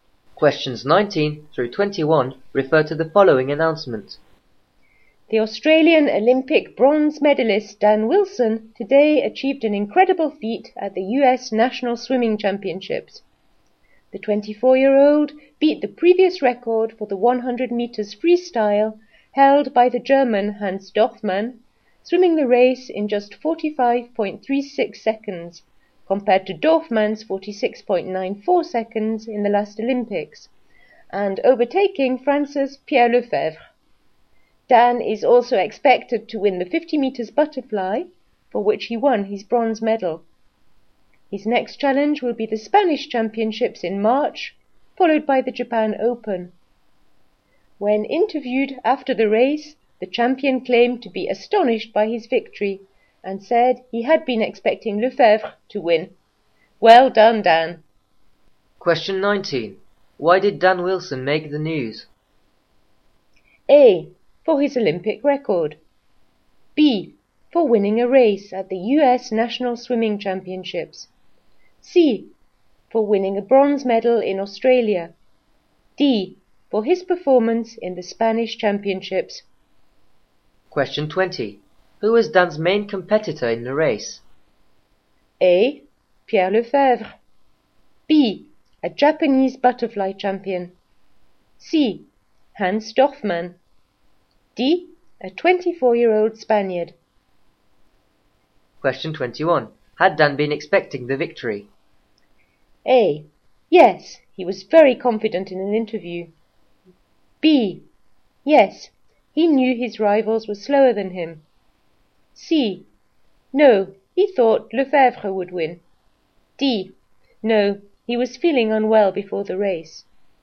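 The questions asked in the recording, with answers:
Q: Why did Dan Wilson make the news?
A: B: For winning a race at the US National Swimming Championships.

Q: Who was Dan's main competitor in the race?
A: A: Pierre Lefebvre.

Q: Had Dan been expecting the victory?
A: C: No, he thought Lefebvre would win.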